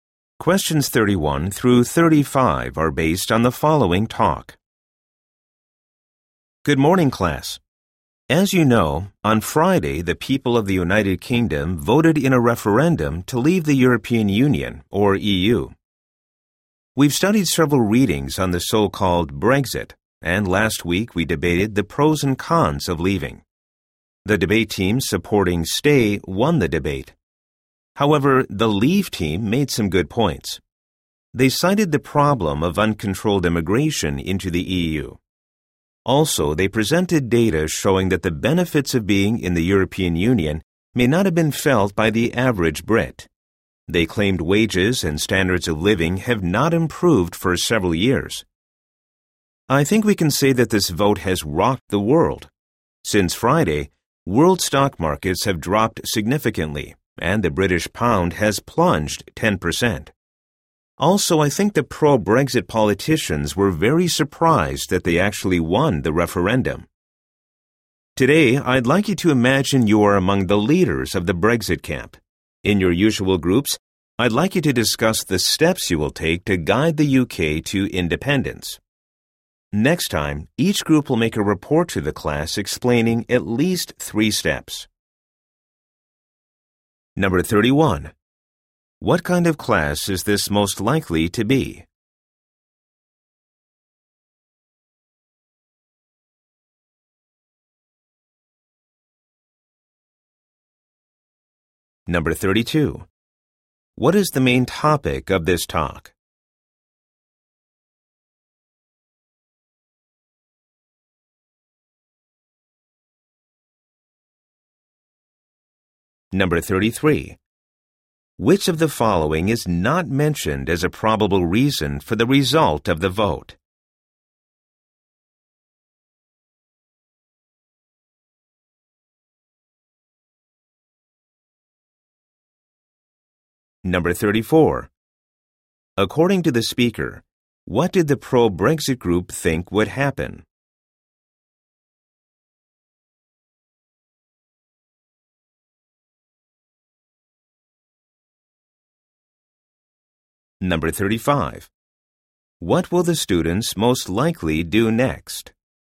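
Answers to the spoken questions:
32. The UK's vote to leave the EU (Brexit)
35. Discuss in groups the steps to guide the UK to independence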